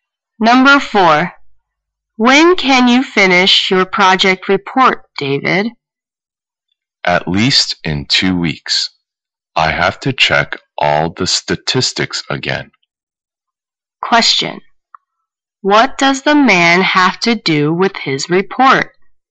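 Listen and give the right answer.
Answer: Check all the statistics again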